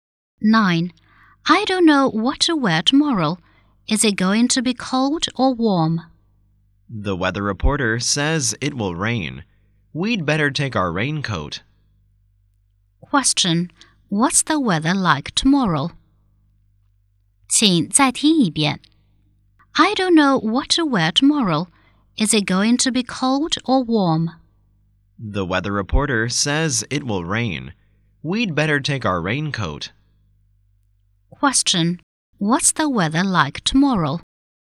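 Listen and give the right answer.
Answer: Rainy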